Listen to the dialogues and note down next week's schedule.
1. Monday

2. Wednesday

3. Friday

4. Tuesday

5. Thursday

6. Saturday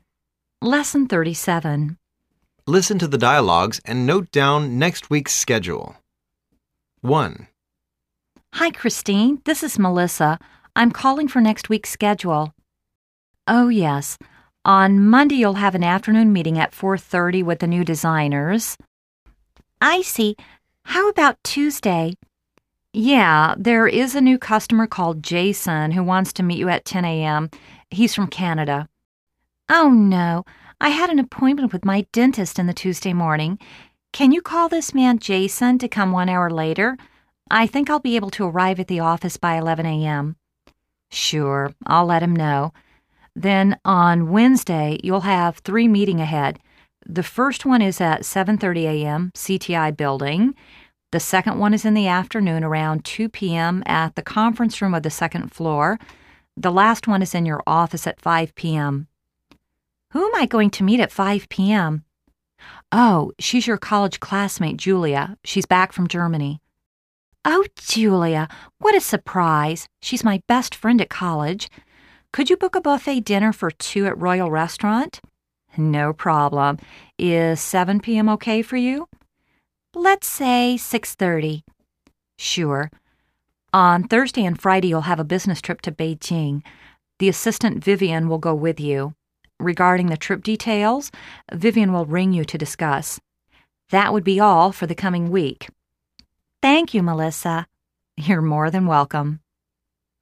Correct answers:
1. 4:30pm - meet up with designers
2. 7:30am - meeting at CTI Building 2:OOpm - meeting at 2nd floor 5:OOpm - meet Julia at office 6:30pm - dinner with Julia at Royal Restaurant
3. Business trip to Beijing with Vivian
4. 11:OOam - meet Jason from Canada
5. Business trip to Beijing with Vivian
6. No activity